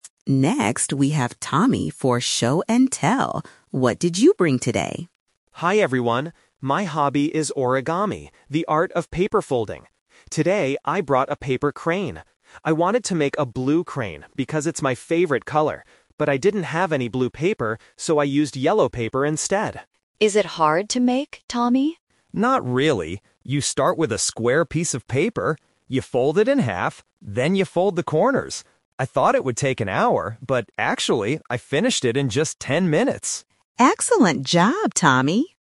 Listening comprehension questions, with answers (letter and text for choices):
Listen to a student talking about his hobby in class. Choose the correct answer (A, B, or C).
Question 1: What color is Tommy's paper crane?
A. Blue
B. Yellow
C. Red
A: B. Yellow

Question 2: What kind of paper do you need to start making a crane?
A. A square piece of paper.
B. A long piece of paper.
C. A thick piece of paper.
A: A. A square piece of paper.

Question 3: How long did it take Tommy to make the crane?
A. Ten minutes.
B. Half an hour.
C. One hour.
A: A. Ten minutes.

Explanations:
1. Tommy says, "...so I used yellow paper instead."
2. When explaining how to make it, Tommy clearly states: "You start with a square piece of paper."
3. Tommy confirms his actual time by saying: "...but actually, I finished it in just ten minutes!"

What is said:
Mrs. Green: Next, we have Tommy for 'Show and Tell'. What did you bring today?
Tommy: Hi everyone. My hobby is Origami, the art of paper folding. Today, I brought a paper crane. I wanted to make a blue crane because it's my favorite color. But I didn't have any blue paper, so I used yellow paper instead.
Emma: Is it hard to make, Tommy?
Tommy: Not really. You start with a square piece of paper. You fold it in half, then you fold the corners. I thought it would take an hour, but actually, I finished it in just ten minutes!
Mrs. Green: Excellent job, Tommy!